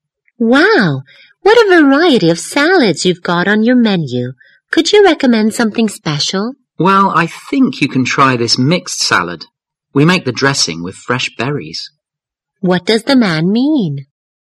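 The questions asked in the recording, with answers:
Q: What does the man mean?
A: He recommends the mixed salad, whose dressing is made with fresh berries.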